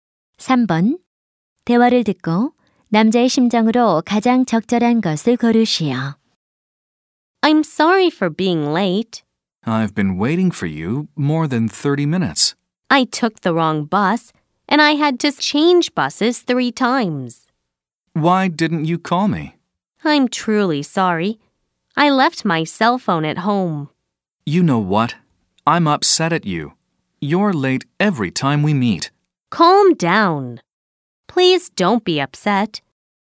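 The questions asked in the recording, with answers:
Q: 대화를 듣고 남자의 심정으로 가장 적절한 것을 고르시오.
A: 화남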